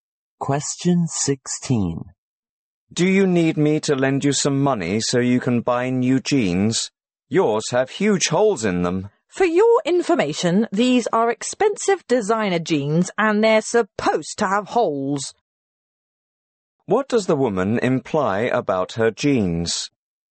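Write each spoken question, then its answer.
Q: What does the woman imply about her jeans?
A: They are expensive designer jeans meant to have holes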